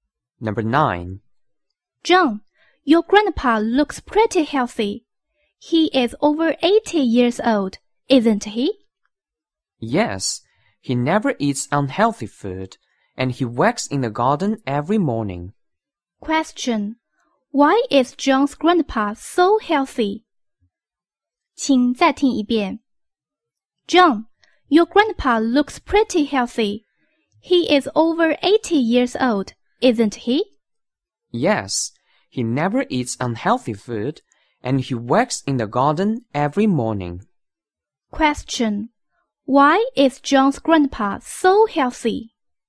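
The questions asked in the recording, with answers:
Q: Why is John's grandpa so healthy?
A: He never eats unhealthy food and works in the garden every morning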